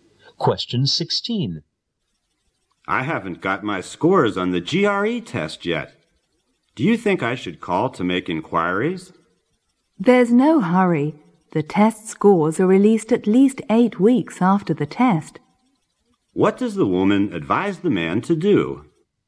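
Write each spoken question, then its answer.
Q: What does the woman advise the man to do?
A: Wait patiently for the scores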